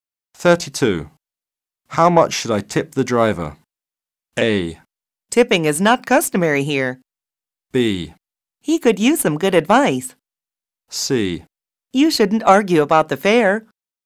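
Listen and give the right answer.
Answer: A: Tipping is not customary here.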